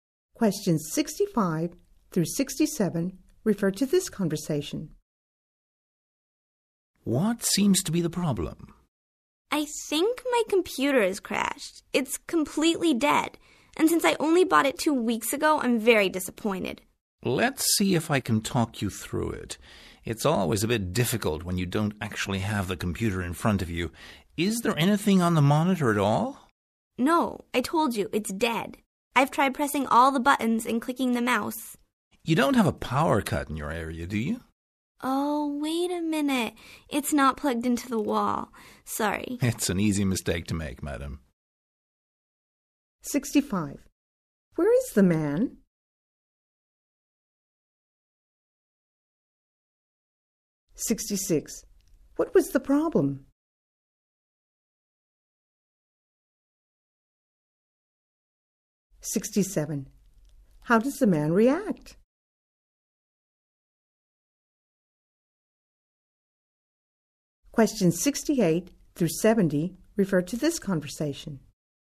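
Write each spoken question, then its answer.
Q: What was the problem?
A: The computer wasn't plugged in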